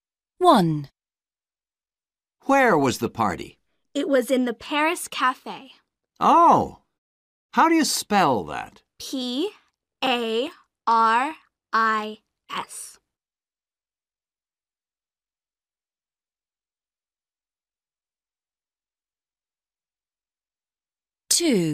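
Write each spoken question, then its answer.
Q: Where was the party?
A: Paris Cafe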